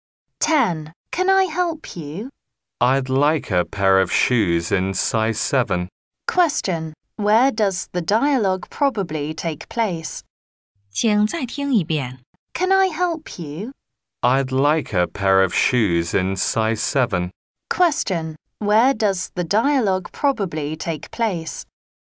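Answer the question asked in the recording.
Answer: In a shoe shop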